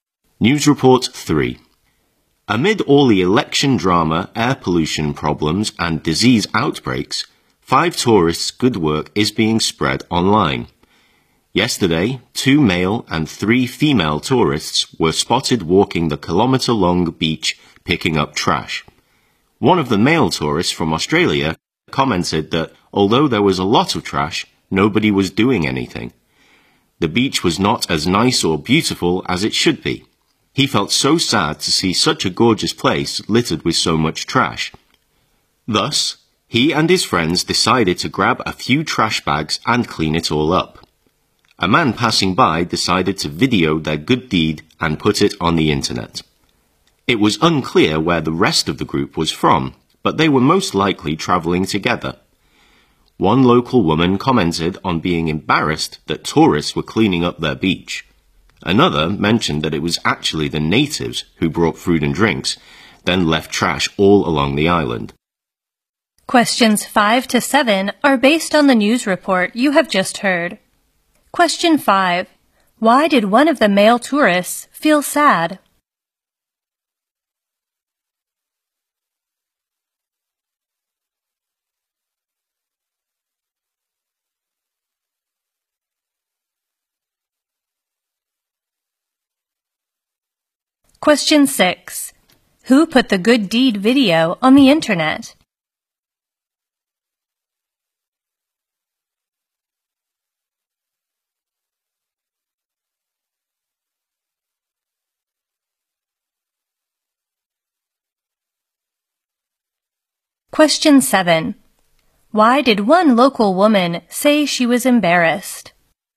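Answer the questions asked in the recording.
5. Such a gorgeous beach was littered with so much trash.
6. A man who was passing by.
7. Tourists were cleaning up the locals' beach.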